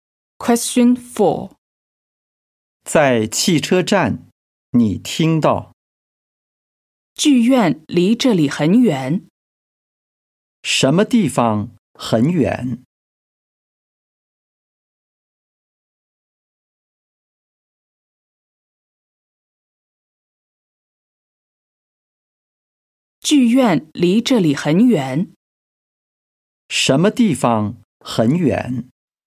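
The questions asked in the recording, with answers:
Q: 什么地方很远?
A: 剧院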